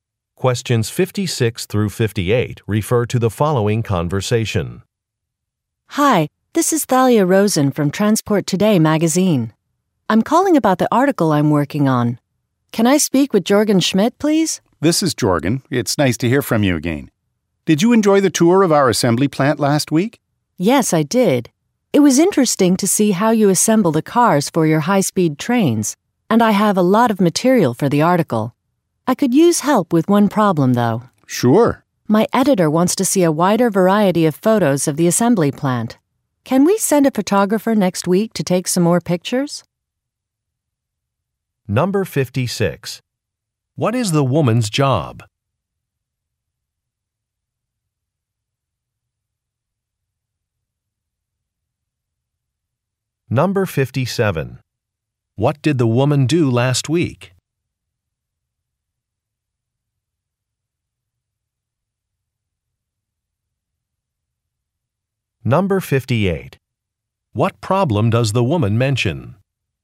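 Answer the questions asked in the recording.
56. Magazine writer
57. Toured an assembly plant
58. Her editor wants more variety of photos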